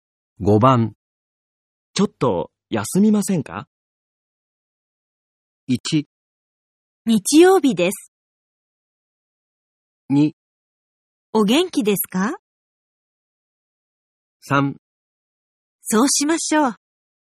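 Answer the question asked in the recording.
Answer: 3: そうしましょう。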